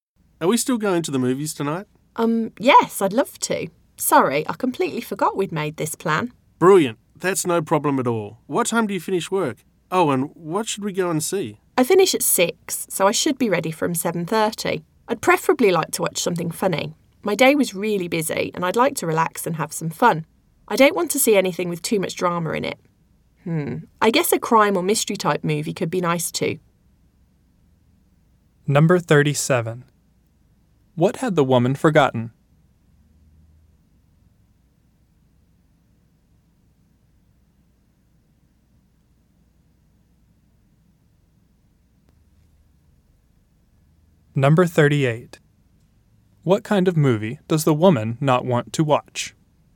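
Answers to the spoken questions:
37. That they had made plans to go to the movies tonight
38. A drama / a movie with too much drama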